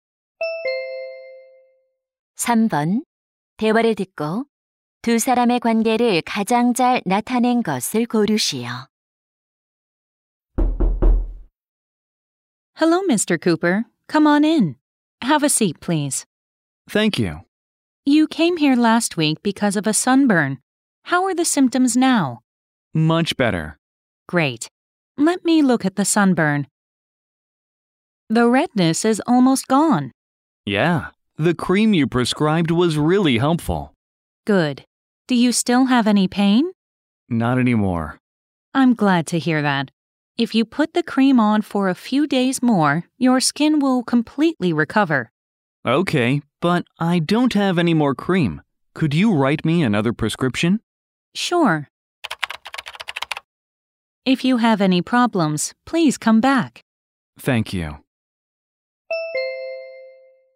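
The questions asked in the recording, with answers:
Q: 대화를 듣고 두 사람의 관계를 가장 잘 나타낸 것을 고르시오.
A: 의사 - 환자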